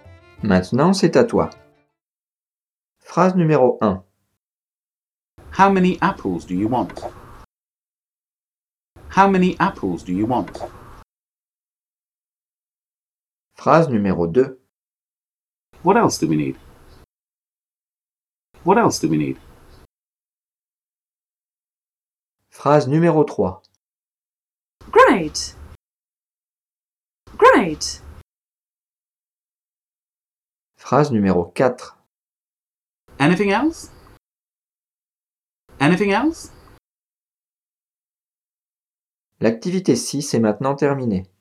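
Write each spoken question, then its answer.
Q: How many apples do you want?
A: question

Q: What else do we need?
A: question

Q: Great!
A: exclamation

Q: Anything else?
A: question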